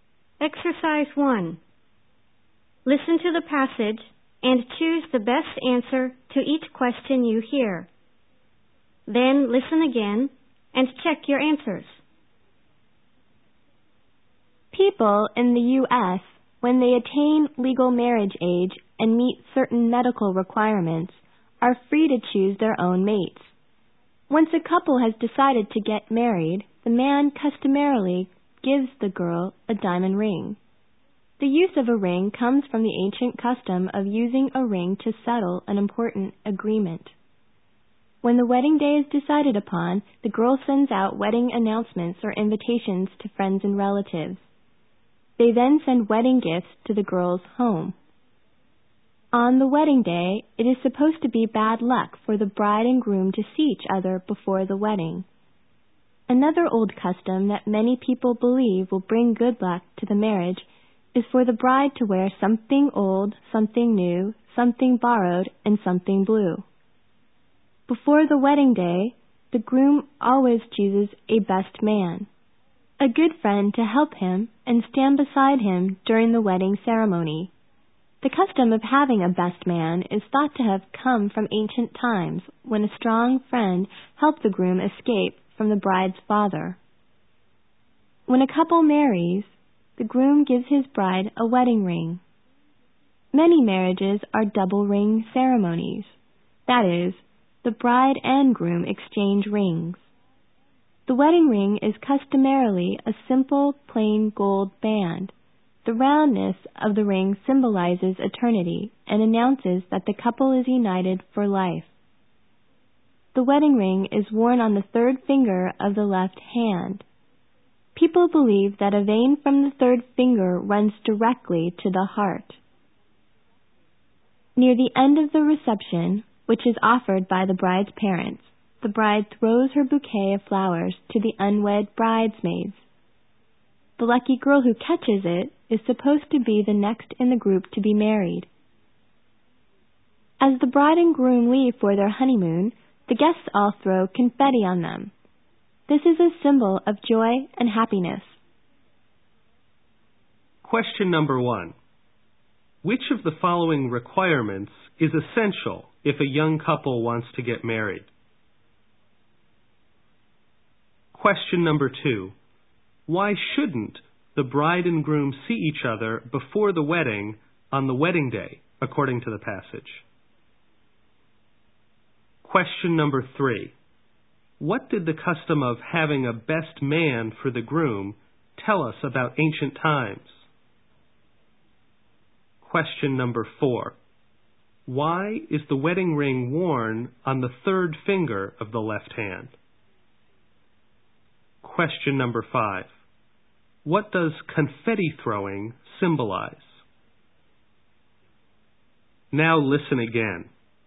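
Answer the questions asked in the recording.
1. Reaching legal marriage age and meeting certain medical requirements
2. It is supposed to be bad luck
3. A strong friend helped the groom escape from the bride's father
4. People believe a vein from that finger runs directly to the heart
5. Joy and happiness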